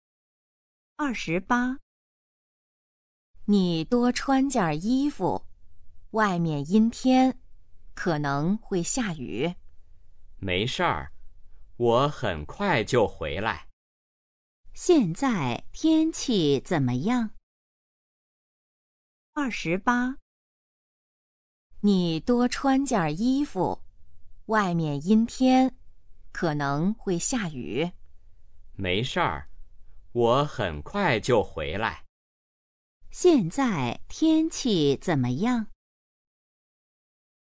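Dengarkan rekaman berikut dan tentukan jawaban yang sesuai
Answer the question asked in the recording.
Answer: 阴天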